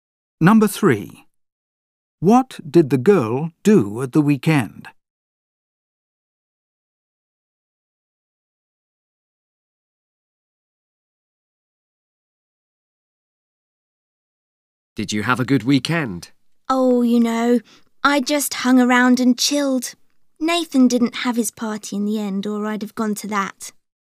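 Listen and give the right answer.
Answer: Nothing much; she just relaxed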